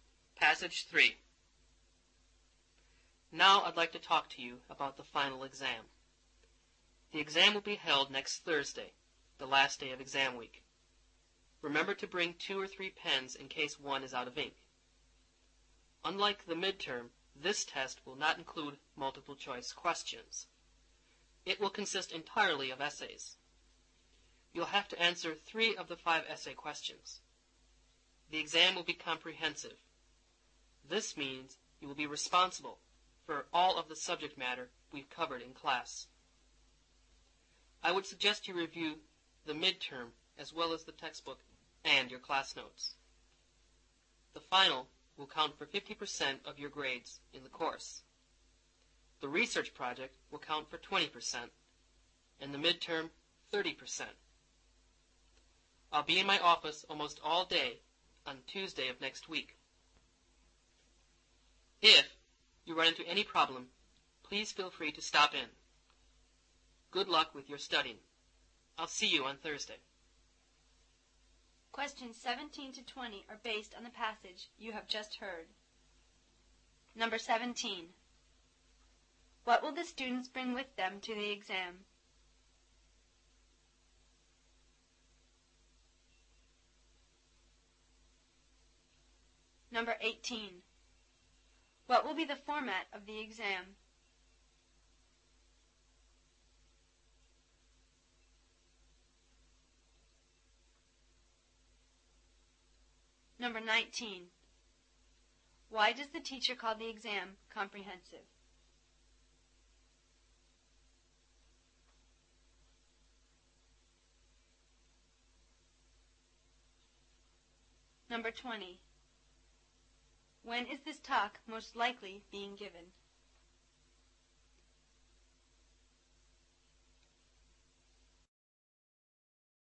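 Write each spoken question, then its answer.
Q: What will the students bring with them to the exam?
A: Two or three pens

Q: What will be the format of the exam?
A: Essays only (answer three of five essay questions)

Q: Why does the teacher call the exam comprehensive?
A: It covers all the subject matter covered in class.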